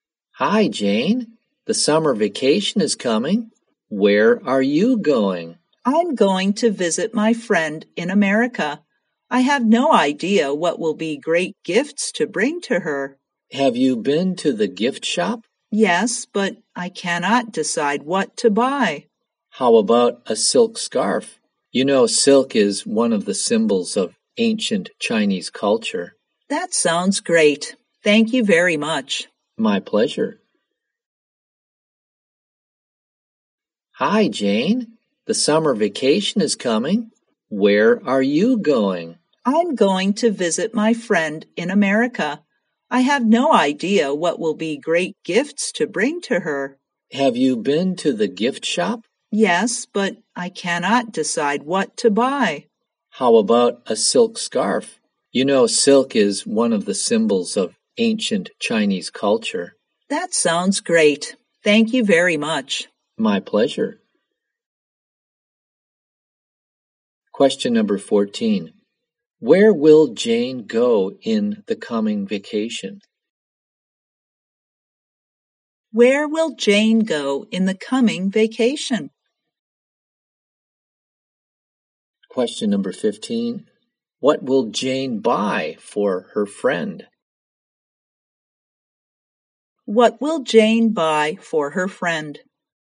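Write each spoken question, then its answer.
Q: Where will Jane go in the coming vacation?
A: America

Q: What will Jane buy for her friend?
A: A silk scarf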